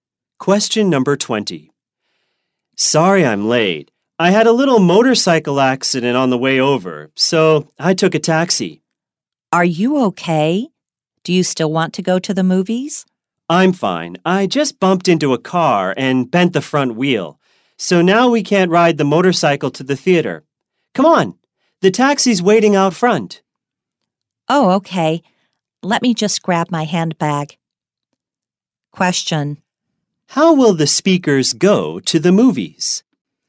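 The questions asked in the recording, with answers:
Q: How will the speakers go to the movies?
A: By taxi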